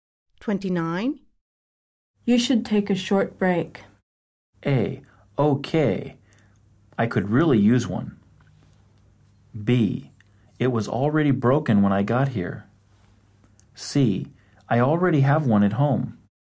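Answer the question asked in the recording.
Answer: A: Okay. I could really use one.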